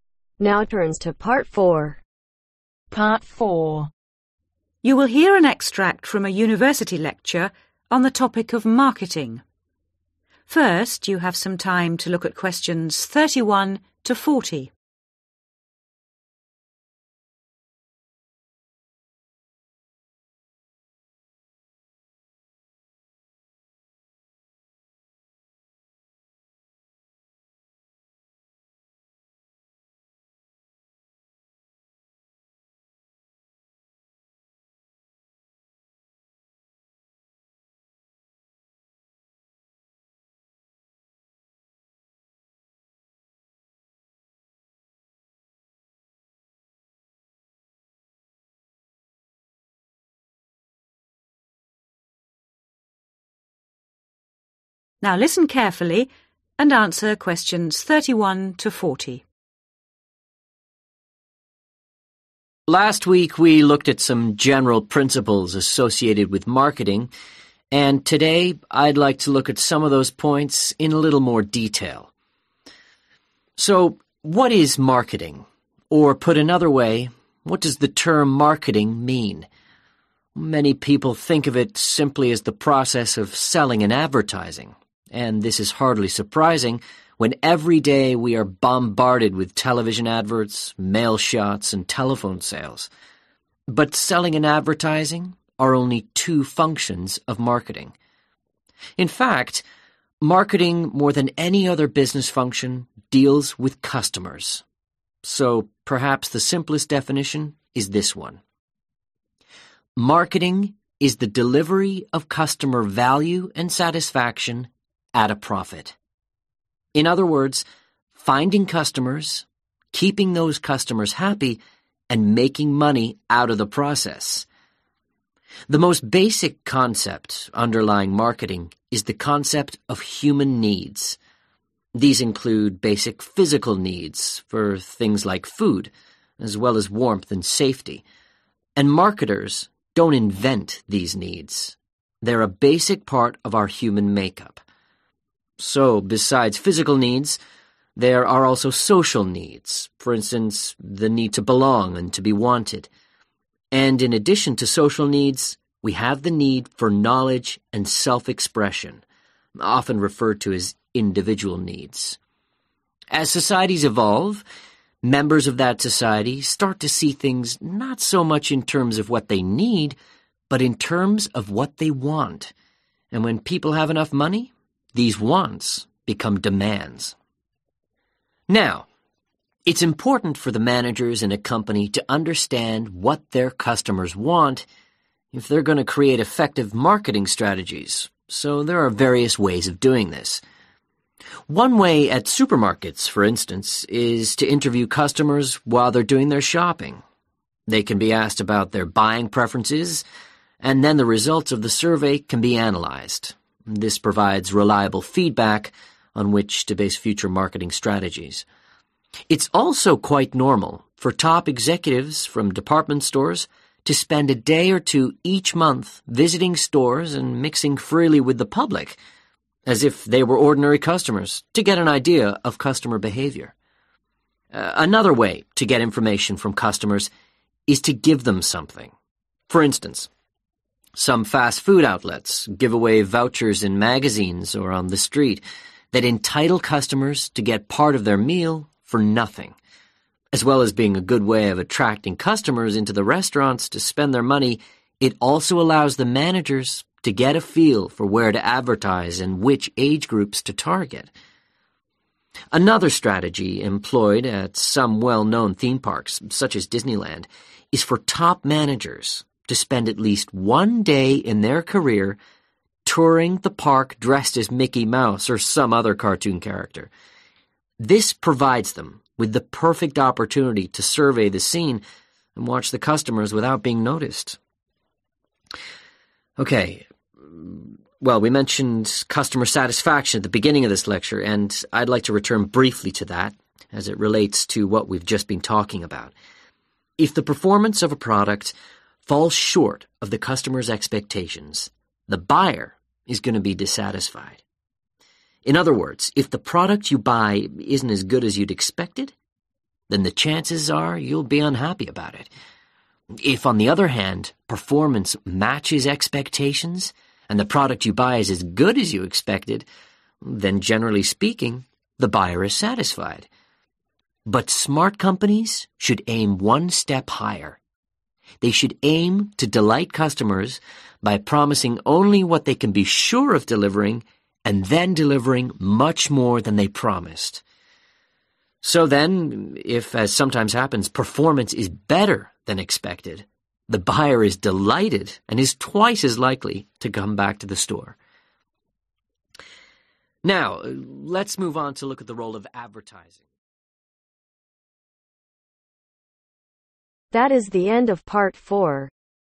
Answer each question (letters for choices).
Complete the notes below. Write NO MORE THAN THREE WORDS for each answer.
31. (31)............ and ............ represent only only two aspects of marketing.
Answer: Selling, advertising

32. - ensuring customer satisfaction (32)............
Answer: Make money

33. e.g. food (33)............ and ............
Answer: Warmth, safety

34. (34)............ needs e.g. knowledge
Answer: Individual

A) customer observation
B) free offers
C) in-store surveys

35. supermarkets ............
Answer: C

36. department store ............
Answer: A

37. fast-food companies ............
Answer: B

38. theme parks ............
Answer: A

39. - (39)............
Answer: Satisfied